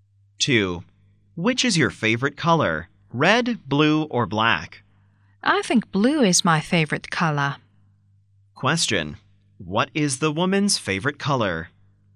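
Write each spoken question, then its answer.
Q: What is the woman's favorite color?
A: Blue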